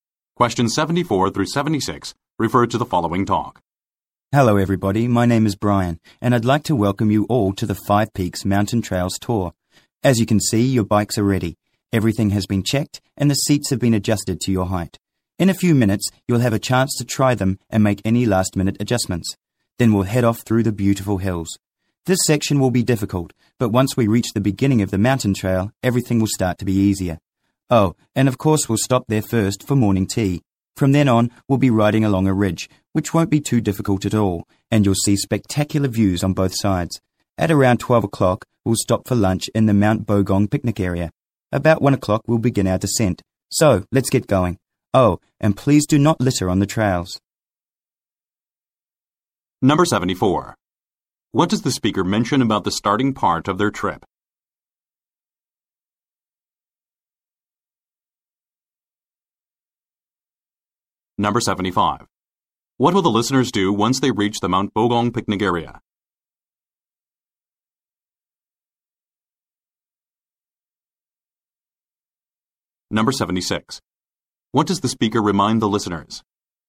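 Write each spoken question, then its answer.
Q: What does the speaker mention about the starting part of their trip?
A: It will be difficult

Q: What will the listeners do once they reach the Mount Bogong picnic area?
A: Have lunch

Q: What does the speaker remind the listeners?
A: Not to litter on the trails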